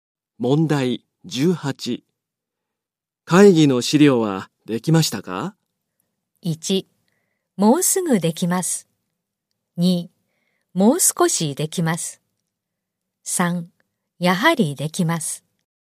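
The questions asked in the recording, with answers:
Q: 会議の資料はできましたか?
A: 1: もうすぐできます。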